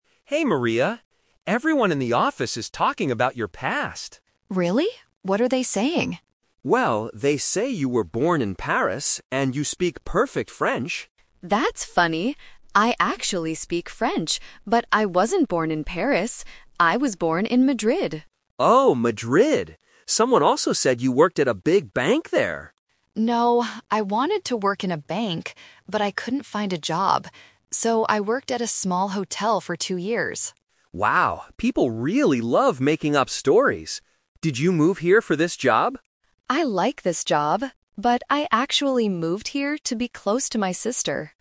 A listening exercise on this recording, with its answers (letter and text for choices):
Listen to two colleagues, Alex and Maria, talking about some office rumors. For each question, choose the correct answer (A, B, or C).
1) Where was Maria born?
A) In Paris.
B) In Madrid.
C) In Rome.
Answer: B) In Madrid.

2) What was Maria's job in Madrid?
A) She worked at a big bank.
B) She worked at a small hotel.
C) She was a French teacher.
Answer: B) She worked at a small hotel.

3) Why did Maria move to her current city?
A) To get a new job.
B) To study at a university.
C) To be close to her sister.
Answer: C) To be close to her sister.

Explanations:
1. Maria corrects the rumor by saying: "...but I wasn't born in Paris. I was born in Madrid." Why the traps are wrong: Option A is the "Twist Trap" (The Rumor). Alex heard she was born in Paris because she speaks French, but that information is false. Option C is not mentioned in the audio.
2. Maria explains her real job: "So, I worked at a small hotel for two years." Why the traps are wrong: Option A is the trap. She wanted to work in a bank (and the office rumor said she did), but she couldn't find a job there. Option C is a distractor based on her ability to speak French.
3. Maria clarifies her real reason for moving: "...but I actually moved here to be close to my sister." Why the traps are wrong: Option A is the "Twist Trap". Alex asks if she moved for the job, and she says she likes the job, but it wasn't the reason she moved. Option B is not mentioned.

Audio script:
Alex: Hey Maria. Everyone in the office is talking about your past.
Maria: Really? What are they saying?
Alex: Well, they say you were born in Paris, and you speak perfect French.
Maria: That's funny! I actually speak French, but I wasn't born in Paris. I was born in Madrid.
Alex: Oh, Madrid! Someone also said you worked at a big bank there.
Maria: No, I wanted to work in a bank, but I couldn't find a job. So, I worked at a small hotel for two years.
Alex: Wow, people really love making up stories. Did you move here for this job?